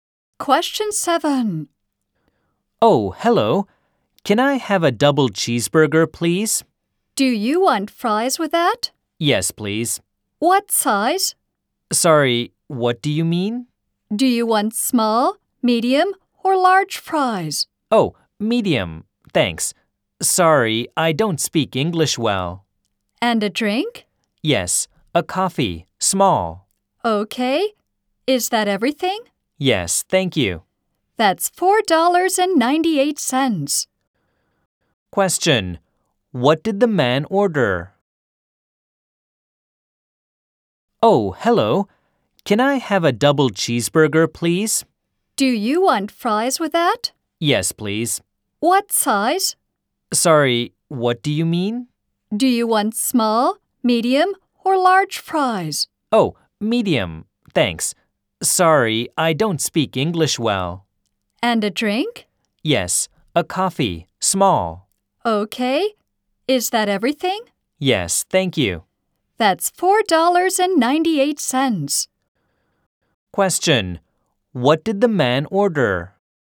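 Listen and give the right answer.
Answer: A double cheeseburger, medium fries, and a small coffee.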